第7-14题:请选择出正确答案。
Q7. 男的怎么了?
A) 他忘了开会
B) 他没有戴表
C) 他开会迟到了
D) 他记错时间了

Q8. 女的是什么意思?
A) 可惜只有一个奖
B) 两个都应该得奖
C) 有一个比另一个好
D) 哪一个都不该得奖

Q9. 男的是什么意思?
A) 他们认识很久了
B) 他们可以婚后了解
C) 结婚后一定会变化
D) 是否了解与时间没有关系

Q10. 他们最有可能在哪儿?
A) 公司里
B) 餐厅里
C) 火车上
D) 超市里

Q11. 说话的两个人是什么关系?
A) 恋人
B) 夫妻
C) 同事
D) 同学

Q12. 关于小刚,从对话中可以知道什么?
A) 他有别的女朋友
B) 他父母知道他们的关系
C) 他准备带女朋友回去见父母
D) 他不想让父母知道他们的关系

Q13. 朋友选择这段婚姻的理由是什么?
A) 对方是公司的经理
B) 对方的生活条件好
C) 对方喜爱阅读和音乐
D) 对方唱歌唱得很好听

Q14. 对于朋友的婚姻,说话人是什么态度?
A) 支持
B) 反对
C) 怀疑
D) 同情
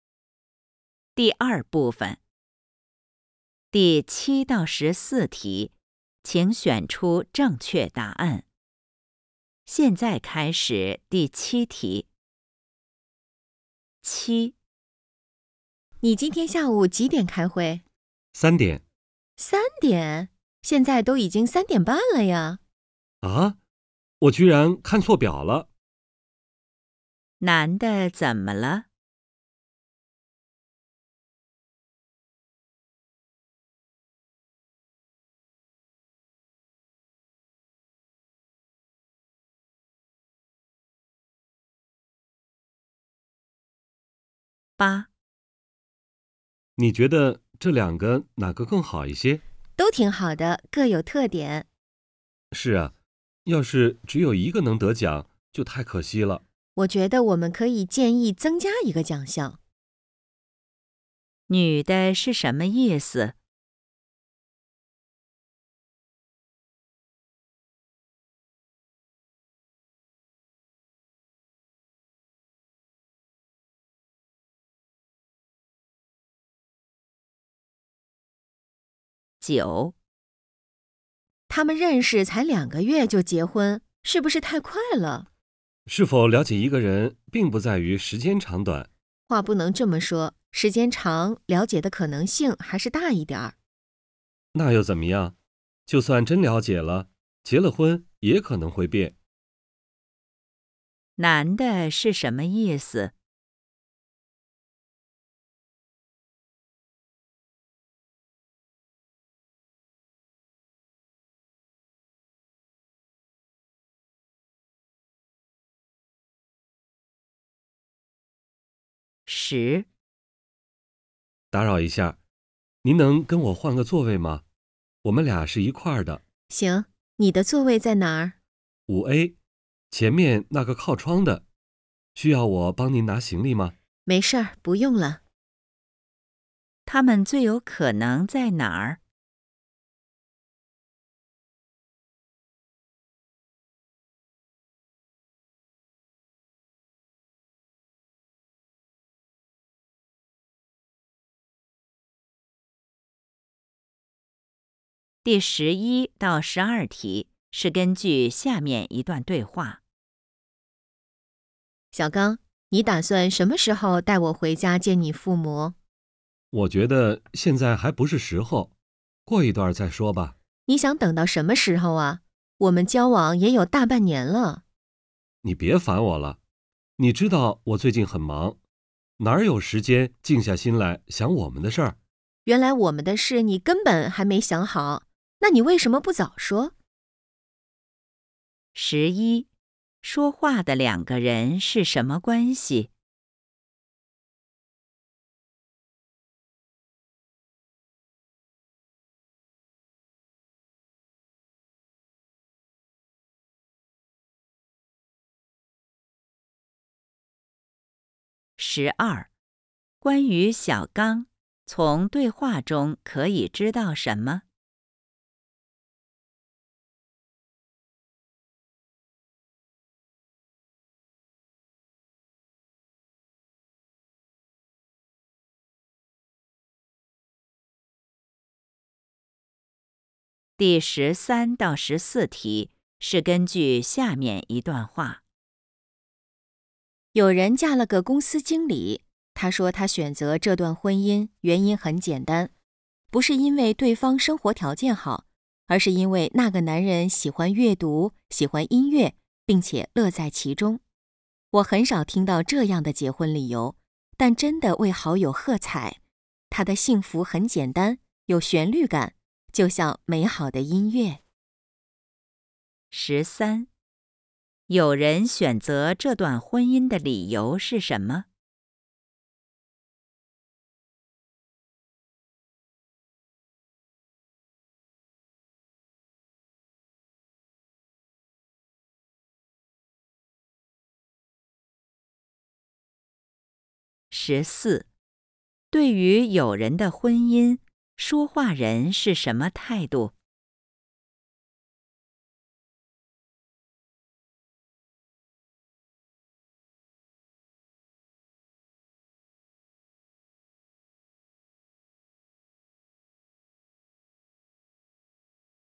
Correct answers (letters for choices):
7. C
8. B
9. D
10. C
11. A
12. D
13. C
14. A

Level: HSK 5